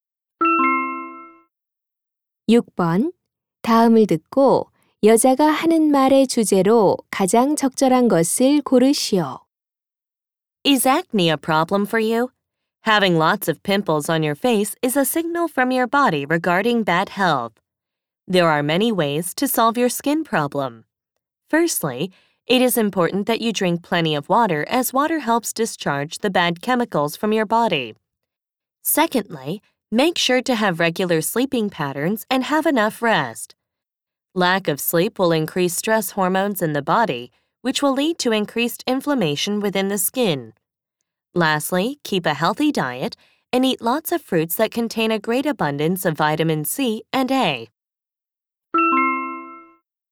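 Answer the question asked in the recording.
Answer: 여드름(피부 문제)을 해결하는 방법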